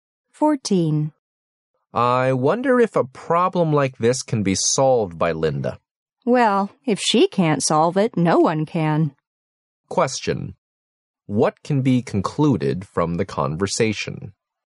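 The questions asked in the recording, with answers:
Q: What can be concluded from the conversation?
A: Linda is the best person to solve the problem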